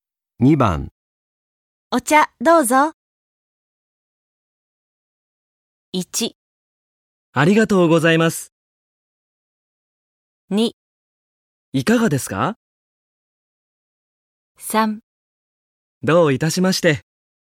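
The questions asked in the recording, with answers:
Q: お茶どうぞ。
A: 1: ありがとうございます。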